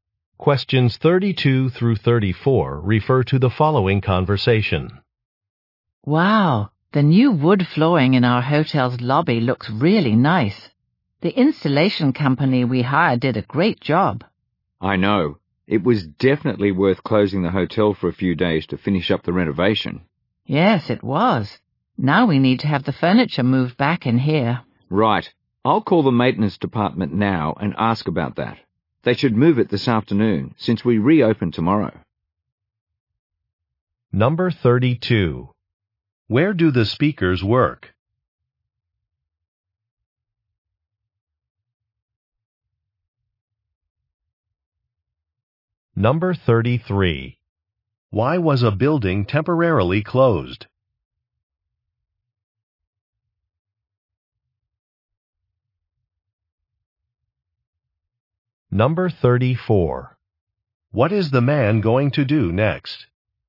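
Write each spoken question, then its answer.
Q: Where do the speakers work?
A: At a hotel

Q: Why was a building temporarily closed?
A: For renovation (new wood flooring installed)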